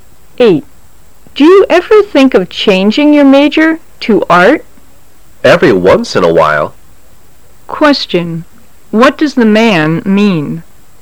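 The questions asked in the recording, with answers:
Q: What does the man mean?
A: He sometimes thinks about changing his major to art.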